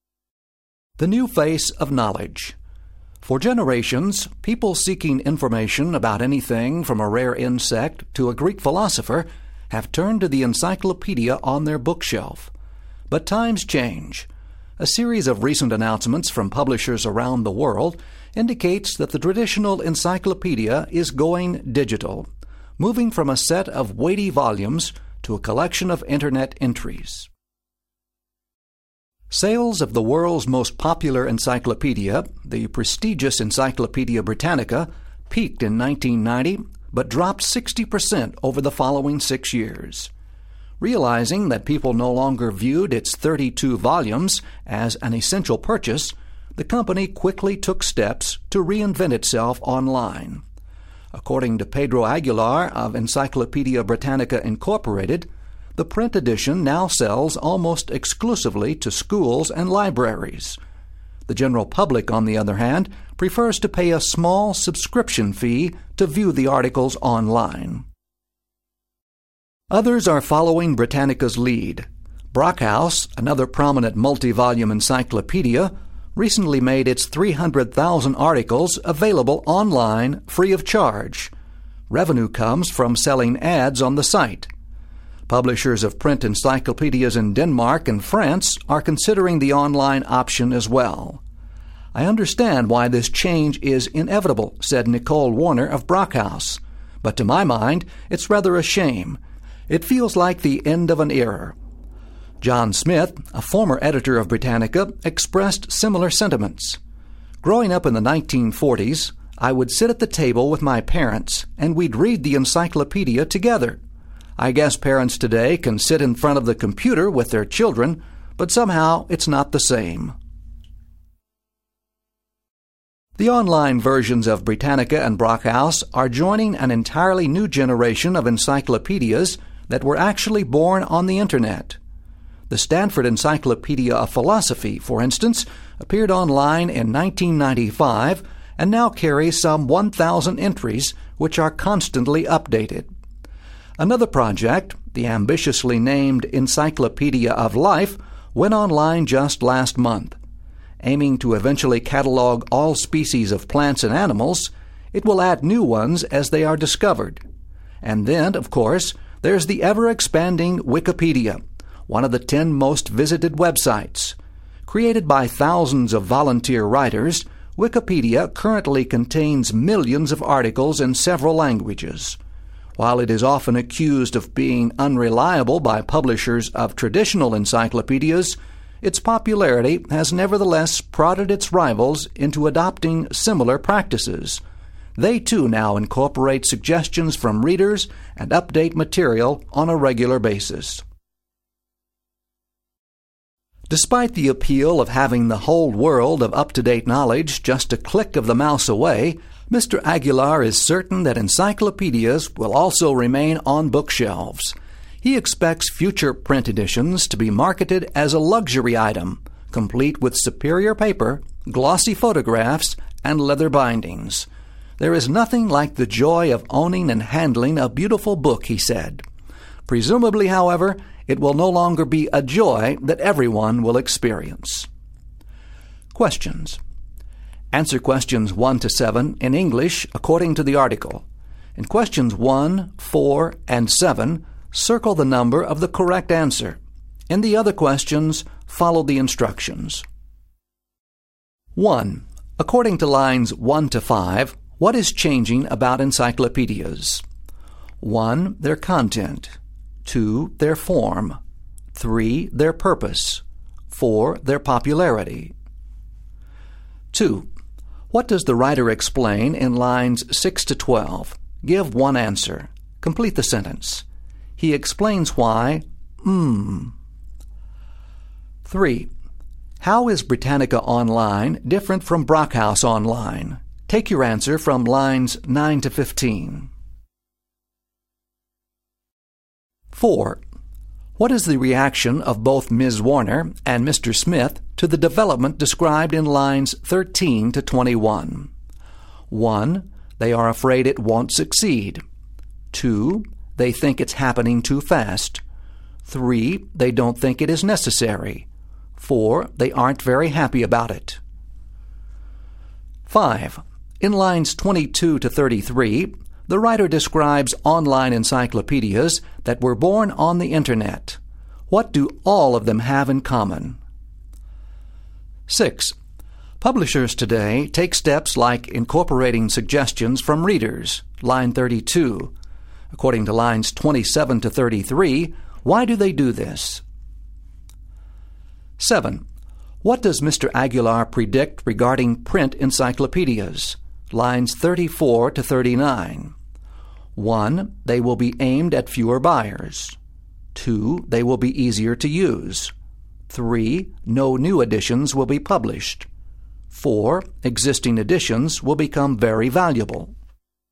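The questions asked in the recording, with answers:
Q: According to lines 1 to 5, what is changing about encyclopedias?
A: 2: Their form.

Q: What does the writer explain in lines 6 to 12?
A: Why Britannica moved online: sales of its print volumes dropped as people no longer saw them as essential.

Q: How is Britannica Online different from Brockhaus Online?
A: Britannica charges a subscription fee; Brockhaus is free and earns money from ads.

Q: What is the reaction of both Ms.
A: 4: They aren't very happy about it.

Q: What do all of them have in common?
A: They are constantly updated and add new material.

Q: According to lines 27 to 33, why do they do this?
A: Because Wikipedia's popularity pushed them to adopt similar practices.

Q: What does Mr. Aguilar predict regarding print encyclopedias?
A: 1: They will be aimed at fewer buyers.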